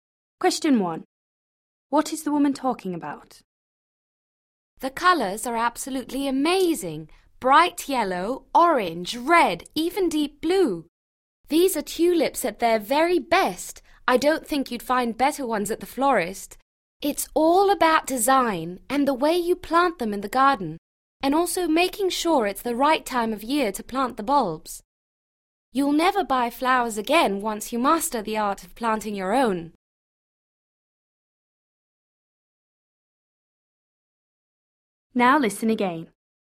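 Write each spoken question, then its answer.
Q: What is the woman talking about?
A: planting tulips in the garden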